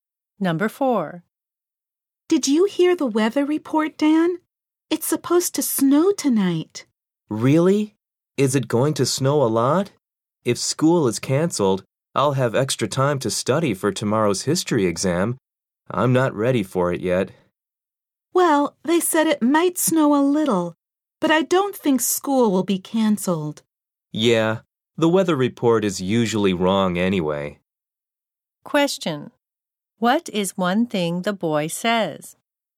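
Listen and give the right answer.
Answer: He is not ready for tomorrow's history exam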